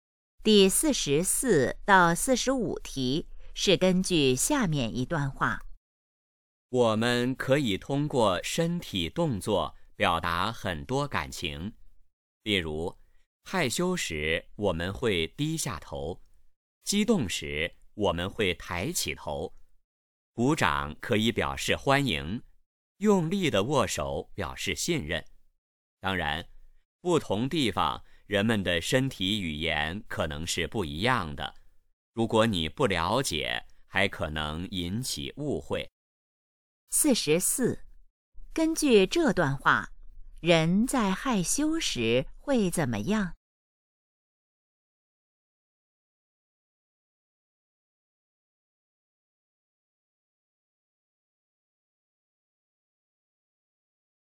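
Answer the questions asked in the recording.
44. 低下头
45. 身体语言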